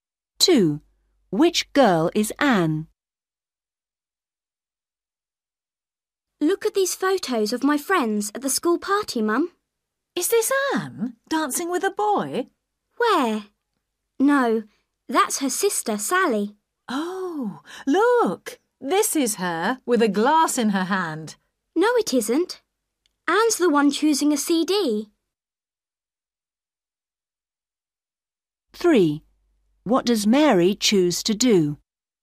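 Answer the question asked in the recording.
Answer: The one choosing a CD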